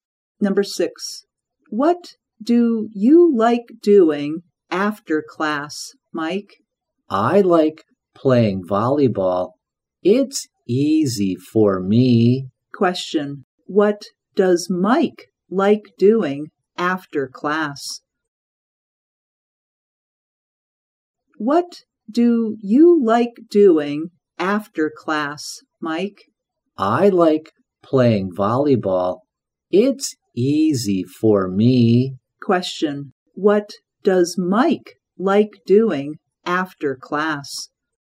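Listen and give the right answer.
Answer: Playing volleyball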